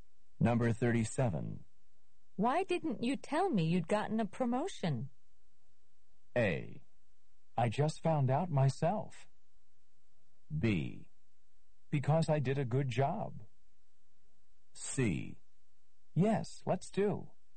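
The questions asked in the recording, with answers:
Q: Why didn't you tell me you'd gotten a promotion?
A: A: I just found out myself.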